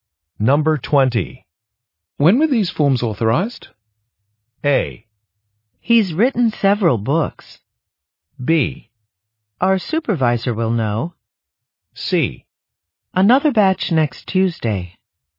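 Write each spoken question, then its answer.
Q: When were these forms authorized?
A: B: Our supervisor will know.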